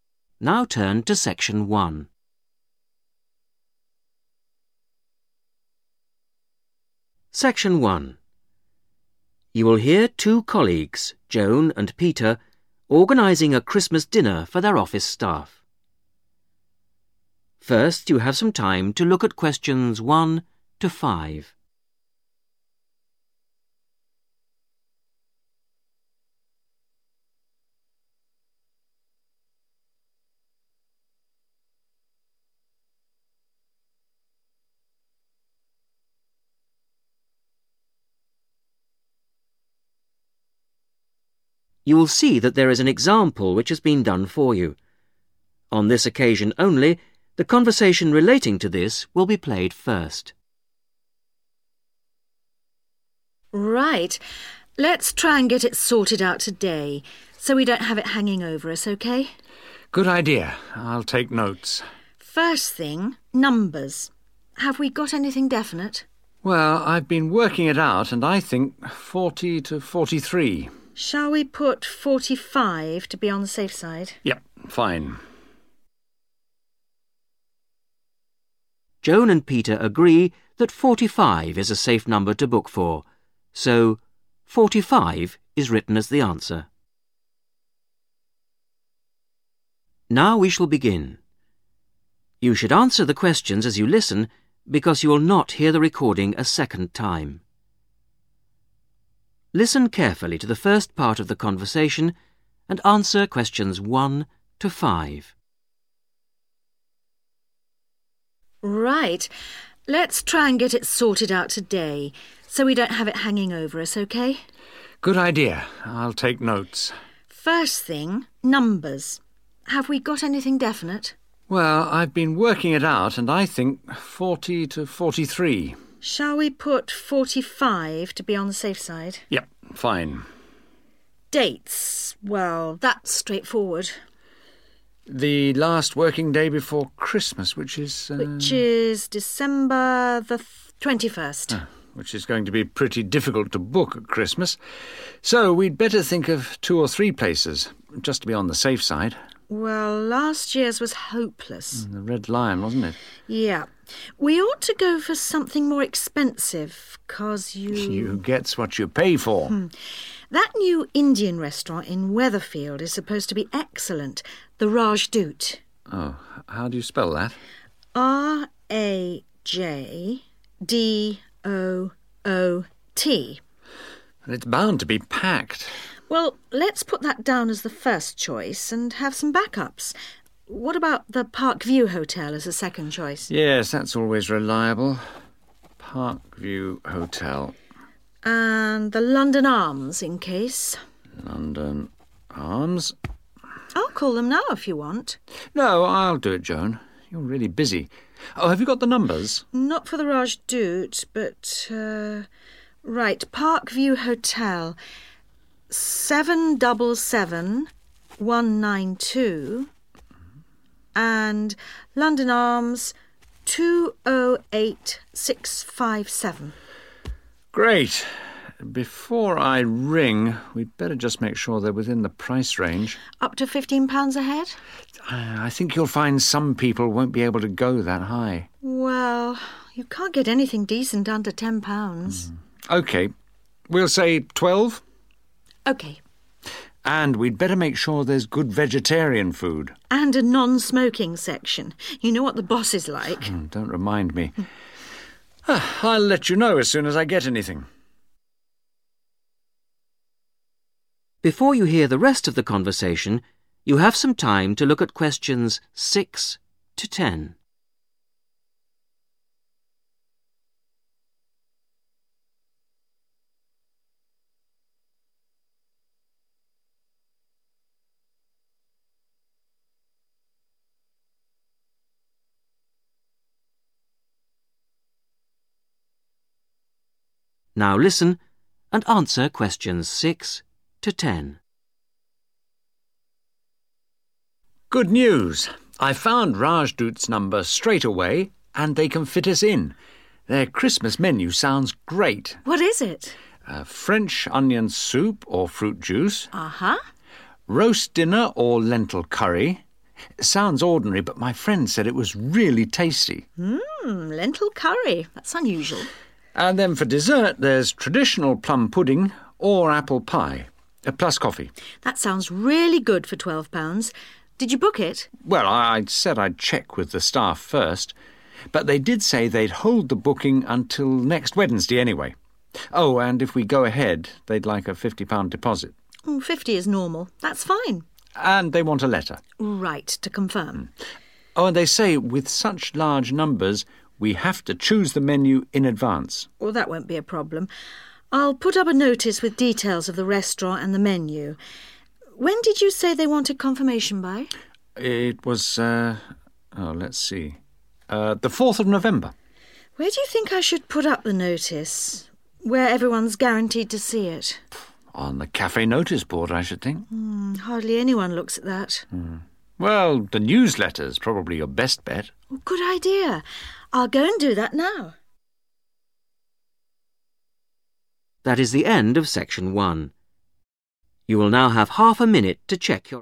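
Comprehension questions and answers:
Complete the notes below. Write NO MORE THAN THREE WORDS AND/OR A NUMBER for each answer.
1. – First choice ➡️ (1) ......................... Tel. number: not known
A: Rajdoot

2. – Second choice ➡️ (2) ......................... Tel. number: 777192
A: Park View Hotel

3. – Third choice ➡️ (3) ......................... Tel. number: (4) .........................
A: London Arms

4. – Third choice ➡️ (3) ......................... Tel. number: (4) .........................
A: 208657

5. Restaurant must have: vegetarian food and a (5) .........................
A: non-smoking section

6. Main course – Roast Dinner OR (6) .........................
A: lentil curry

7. (7) ......................... and letter of confirmation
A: £50 deposit

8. and we must (8) ......................... in advance.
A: choose the menu

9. Must confirm in writing by: (9) .........................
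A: 4th November

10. Put notice in (10) .........................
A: the newsletter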